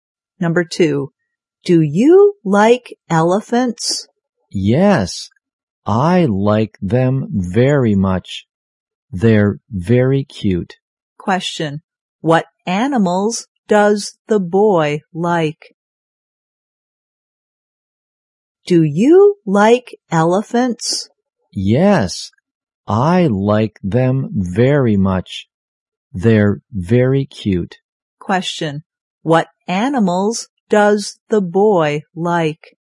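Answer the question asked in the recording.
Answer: Elephants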